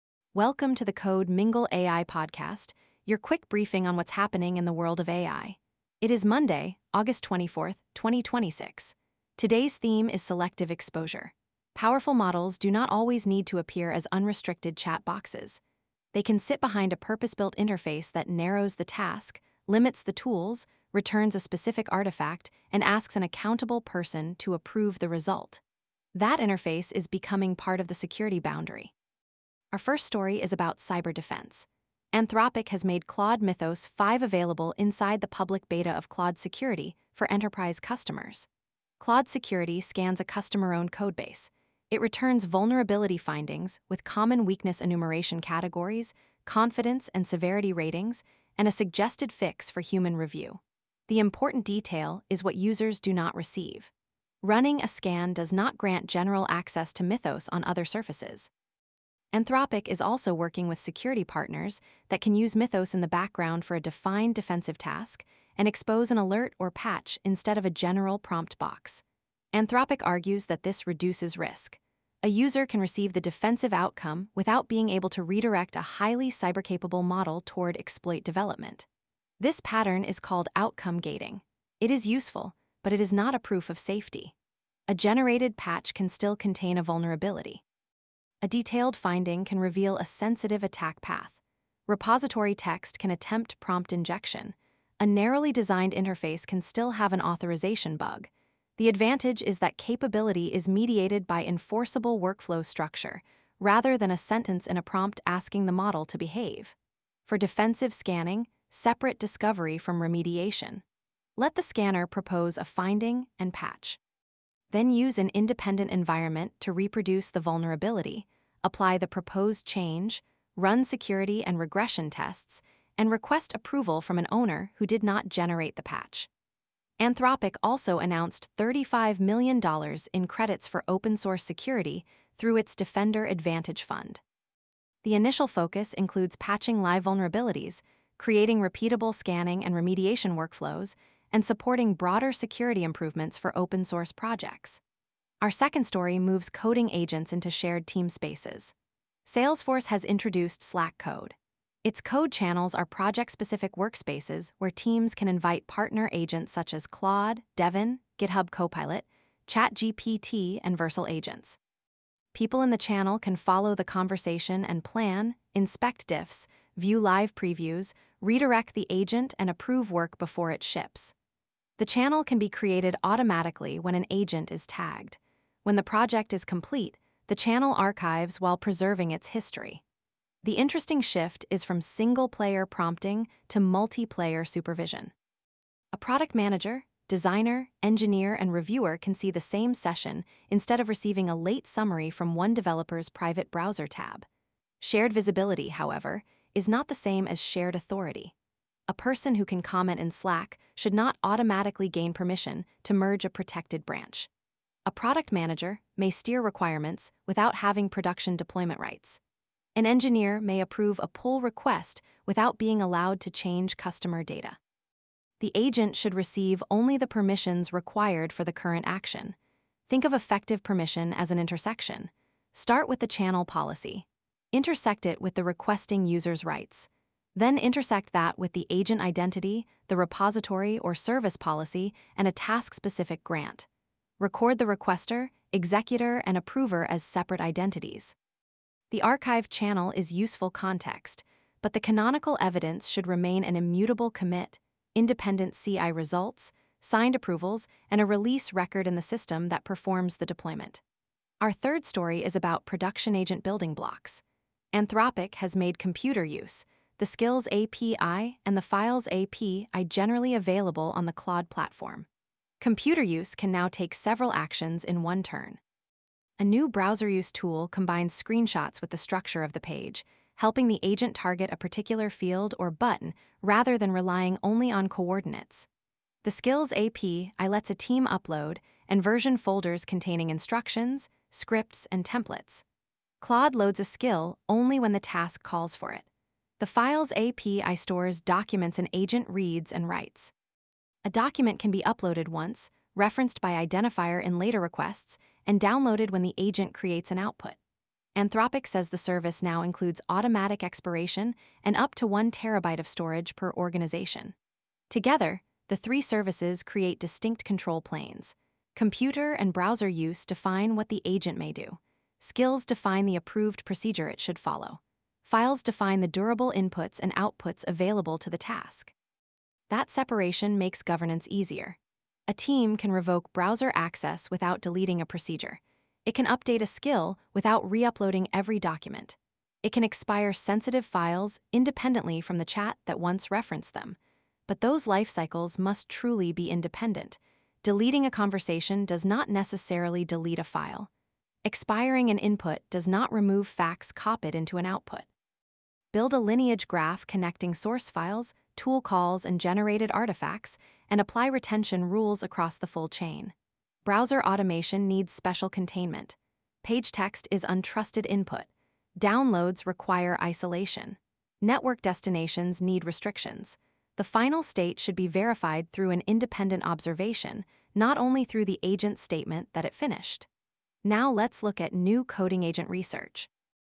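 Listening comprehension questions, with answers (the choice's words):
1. How does Anthropic limit exposure to Claude Mythos 5 in its defensive security workflow?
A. It gives every user unrestricted model access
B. It returns constrained findings and suggested patches without extending general Mythos access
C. It publishes all model weights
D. It disables human review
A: It returns constrained findings and suggested patches without extending general Mythos access

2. What is the central collaboration change introduced by Slack Code?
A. Agents work only in private direct messages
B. All repository permissions are replaced by Slack membership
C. Agent coding sessions become shared project channels with plans, diffs, previews, steering, and approvals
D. Human participants can no longer stop an agent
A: Agent coding sessions become shared project channels with plans, diffs, previews, steering, and approvals

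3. What do Anthropic's computer-use, Skills, and Files APIs control respectively?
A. Model size, training location, and benchmark score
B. Actions, approved procedures, and durable task documents or outputs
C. Billing, marketing, and hiring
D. Only three different prompt templates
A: Actions, approved procedures, and durable task documents or outputs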